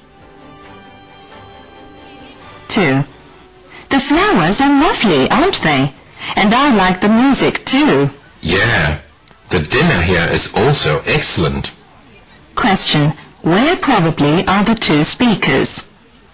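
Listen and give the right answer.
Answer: In a restaurant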